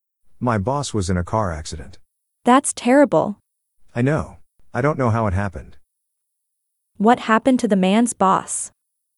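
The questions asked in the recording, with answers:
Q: What happened to the man's boss?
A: He was in a car accident.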